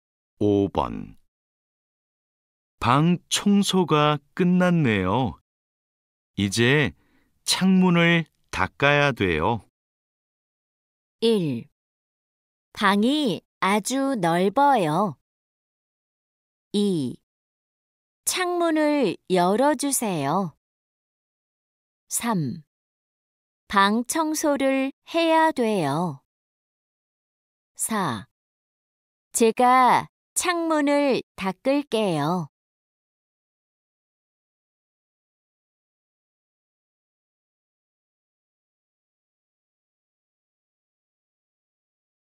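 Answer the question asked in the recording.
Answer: 4: 제가 창문을 닦을게요.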